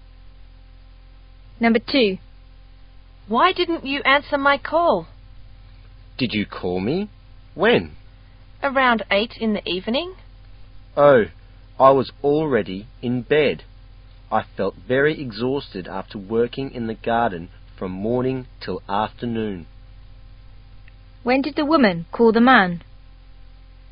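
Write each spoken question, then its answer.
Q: When did the woman call the man?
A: Around 8 in the evening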